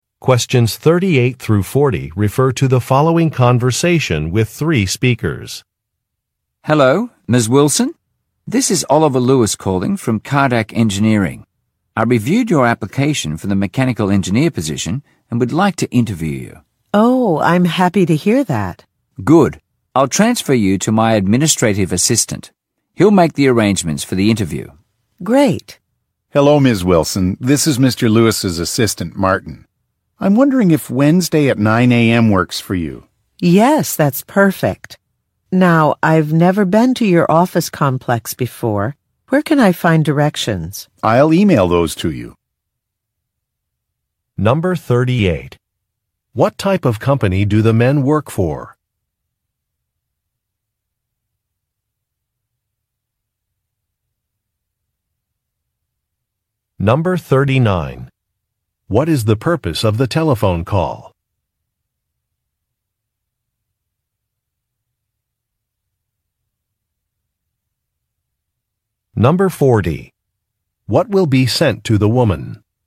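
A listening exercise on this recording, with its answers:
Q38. What type of company do the men work for?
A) An architectural firm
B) An engineering firm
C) A construction company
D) An electronics manufacturer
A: B) An engineering firm

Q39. What is the purpose of the telephone call?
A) To cancel an order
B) To arrange an interview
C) To ask about a policy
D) To confirm a reservation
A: B) To arrange an interview

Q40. What will be sent to the woman?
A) A magazine article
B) A warranty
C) Directions to a location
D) Instructions for refunds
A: C) Directions to a location

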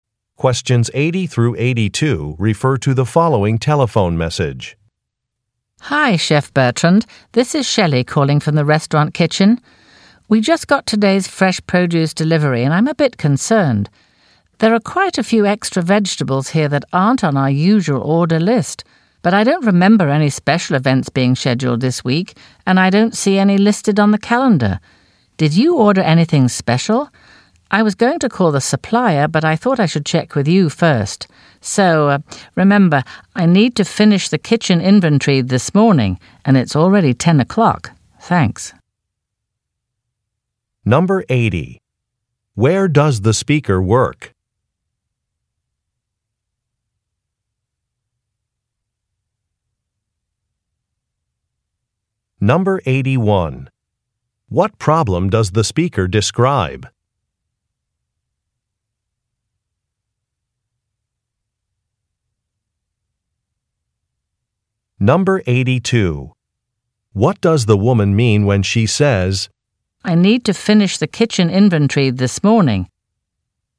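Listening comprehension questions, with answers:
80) Where does the speaker work?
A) At a farm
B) At a market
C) At a restaurant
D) At a shipping company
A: C) At a restaurant

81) What problem does the speaker describe?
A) A staff member is not at work.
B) Extra items were delivered.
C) A business is closed.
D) A special event has been canceled.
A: B) Extra items were delivered.

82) IWhat does the woman mean when she says, "I need to finish the kitchen inventory this morning"?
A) She does not have enough ingredients.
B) Nobody has offered to help her.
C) She would like a response soon.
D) A special event will take place this afternoon.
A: C) She would like a response soon.

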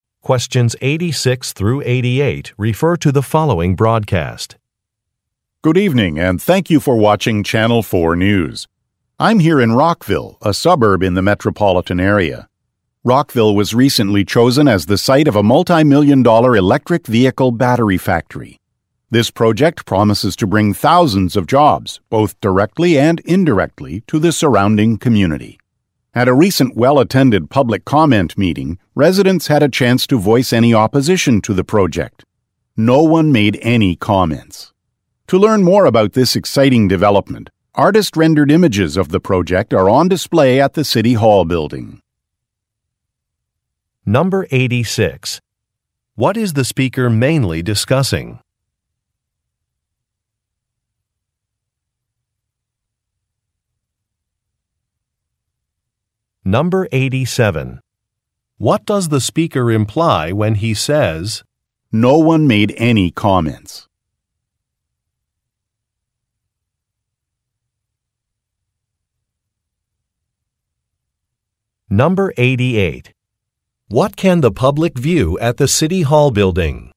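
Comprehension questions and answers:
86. What is the speaker mainly discussing?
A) A job fair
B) A factory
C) Some traffic patterns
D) A prototype electric vehicle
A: B) A factory

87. What does the speaker imply when he says, "No one made any comments"?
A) Few people were in attendance.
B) Another meeting will be scheduled.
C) A project has community support.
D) A public comment period has ended.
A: C) A project has community support.

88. What can the public view at the city hall building?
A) An official contract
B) Some images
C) A list of companies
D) Some facts about local politicians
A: B) Some images

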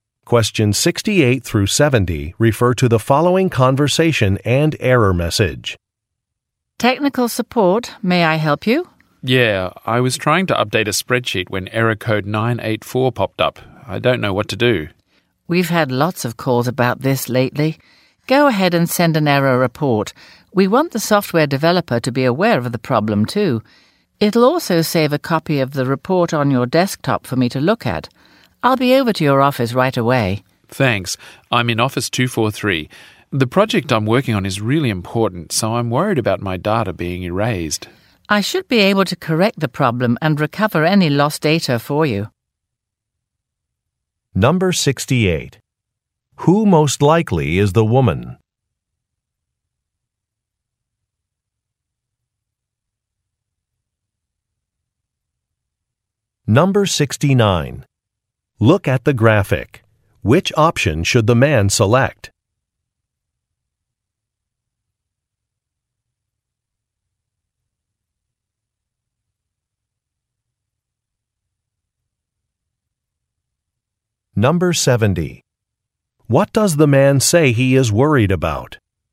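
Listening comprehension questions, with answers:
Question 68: Who most likely is the woman?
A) A job applicant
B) A financial analyst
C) A software salesperson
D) A computer technician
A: D) A computer technician

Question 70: What does the man say he is worried about?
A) Locating a laptop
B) Meeting sales goals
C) Losing some data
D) Missing a deadline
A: C) Losing some data

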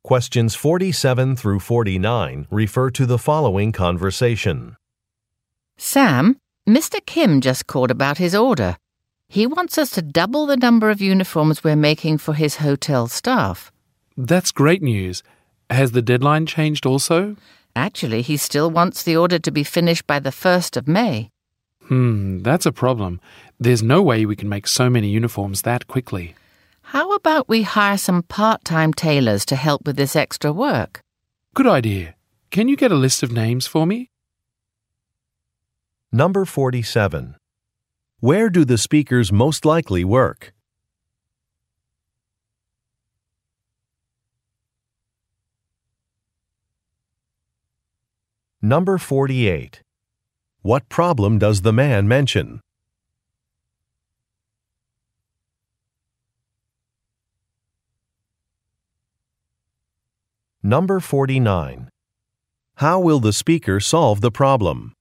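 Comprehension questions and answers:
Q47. Where do the speakers most likely work?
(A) At a local hotel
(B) At an employment agency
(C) At a clothing manufacturer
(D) At a laundry service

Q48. What problem does the man mention?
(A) A machine is broken.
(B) A deadline is not realistic.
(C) An item is poorly made.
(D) A supplier went out of business.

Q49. How will the speakers solve the problem?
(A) By hiring additional staff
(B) By purchasing more material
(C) By updating some machinery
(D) By negotiating with a business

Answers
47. (C) At a clothing manufacturer
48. (B) A deadline is not realistic.
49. (A) By hiring additional staff

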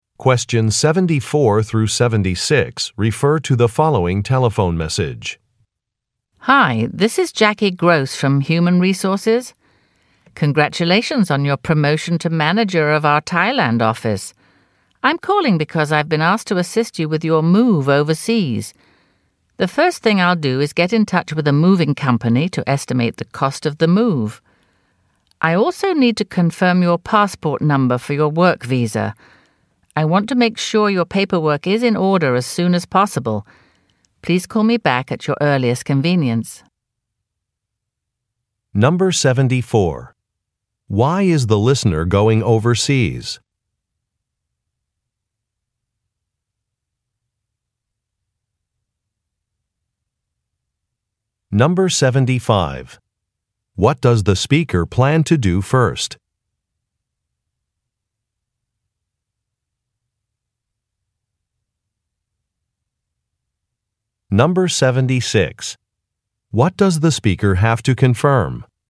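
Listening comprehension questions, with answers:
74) Why is the listener going overseas?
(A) To attend a sales conference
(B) To manage an office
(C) To meet some clients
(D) To go on a tour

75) What does the speaker plan to do first?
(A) Organize a business dinner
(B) Reserve airline seats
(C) Purchase some merchandise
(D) Contact a moving company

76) What does the speaker have to confirm?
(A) Travel dates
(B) Account information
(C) A passport number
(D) Vaccination requirements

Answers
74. (B) To manage an office
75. (D) Contact a moving company
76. (C) A passport number

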